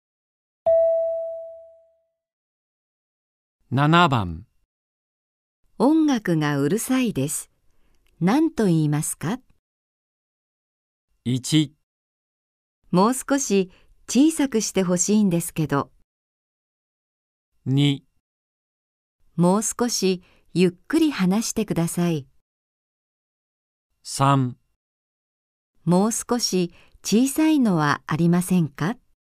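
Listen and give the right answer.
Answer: 1: もう少し小さくしてほしいんですけど。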